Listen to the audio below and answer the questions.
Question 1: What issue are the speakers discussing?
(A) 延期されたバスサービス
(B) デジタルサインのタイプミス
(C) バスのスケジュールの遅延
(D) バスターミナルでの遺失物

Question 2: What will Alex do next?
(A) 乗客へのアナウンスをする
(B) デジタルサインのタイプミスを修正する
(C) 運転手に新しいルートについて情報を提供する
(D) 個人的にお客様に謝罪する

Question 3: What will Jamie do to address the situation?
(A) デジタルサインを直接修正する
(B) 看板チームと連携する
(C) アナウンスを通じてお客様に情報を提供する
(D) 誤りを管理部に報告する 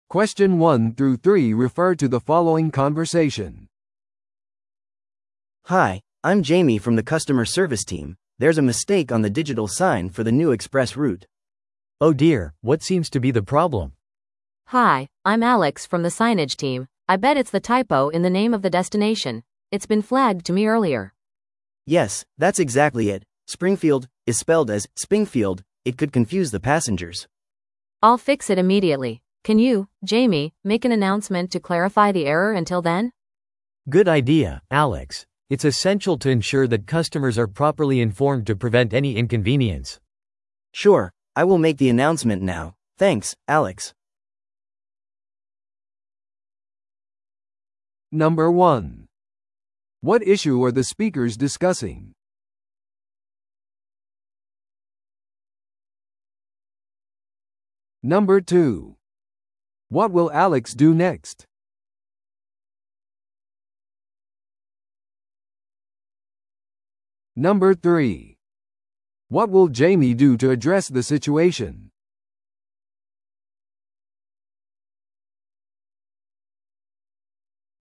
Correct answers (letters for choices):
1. B
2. B
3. C

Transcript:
A: Hi, I'm Jamie from the customer service team. There's a mistake on the digital sign for the new express route.
B: Oh dear, what seems to be the problem?
C: Hi, I'm Alex from the signage team. I bet it's the typo in the name of the destination; it's been flagged to me earlier.
A: Yes, that's exactly it. 'Springfield' is spelled as 'Spingfield'. It could confuse the passengers.
C: I'll fix it immediately. Can you, Jamie, make an announcement to clarify the error until then?
B: Good idea, Alex. It's essential to ensure that customers are properly informed to prevent any inconvenience.
A: Sure, I will make the announcement now. Thanks, Alex.